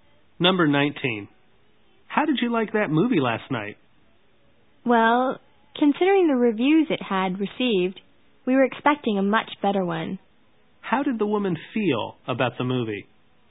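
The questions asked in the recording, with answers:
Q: How did the woman feel about the movie?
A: Disappointed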